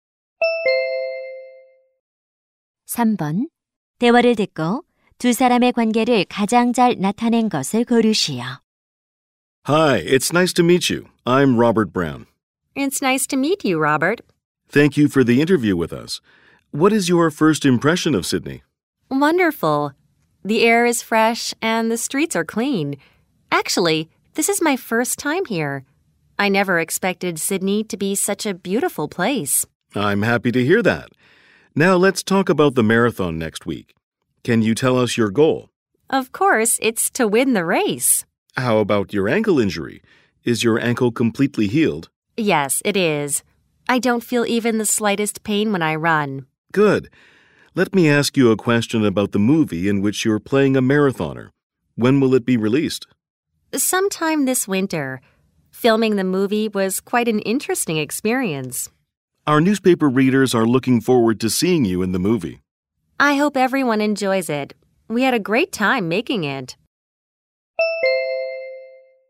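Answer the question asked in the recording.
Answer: 신문 기자 - 마라톤 선수(배우)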